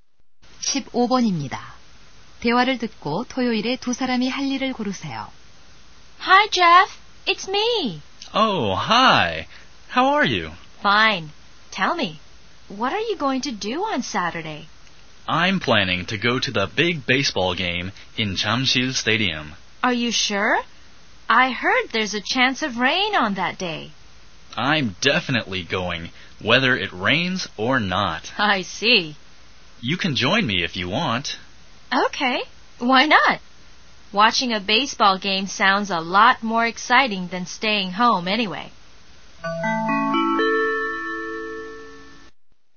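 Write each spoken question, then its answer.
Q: 대화를 듣고 토요일에 두 사람이 할 일을 고르세요.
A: 잠실 야구장에서 야구 경기 관람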